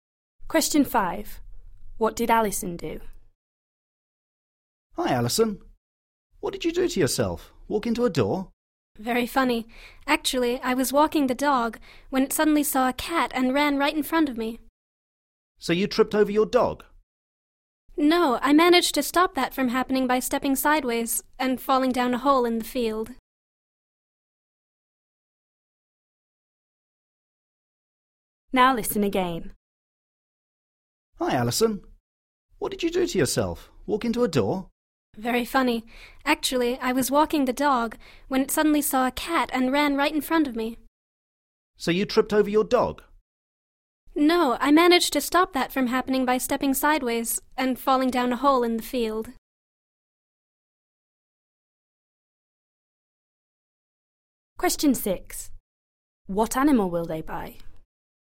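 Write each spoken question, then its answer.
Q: What did Alison do?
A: She fell down a hole in the field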